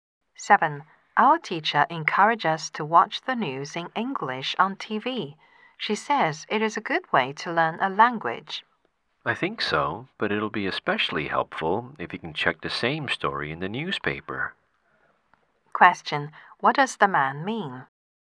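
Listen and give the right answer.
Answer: Watching English news helps more if you also read the same story in the newspaper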